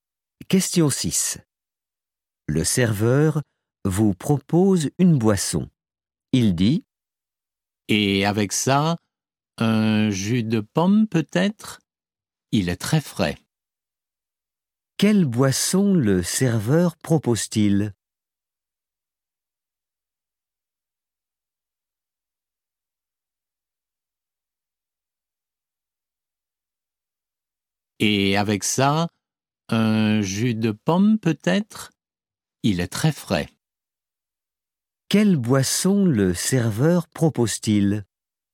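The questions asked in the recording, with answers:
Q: Quelle boisson le serveur propose-t-il ?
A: Un jus de pomme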